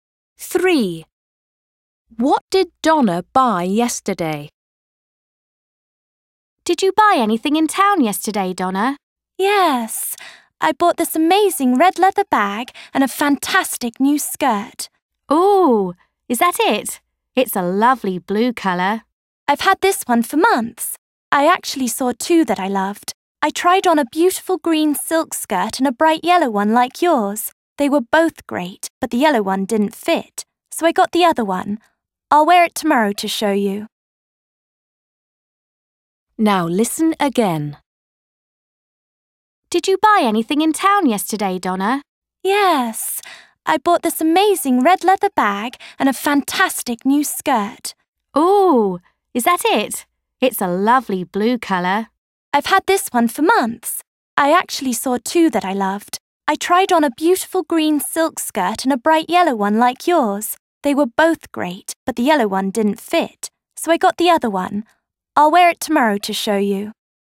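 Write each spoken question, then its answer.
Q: What did Donna buy yesterday?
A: a red leather bag and a green silk skirt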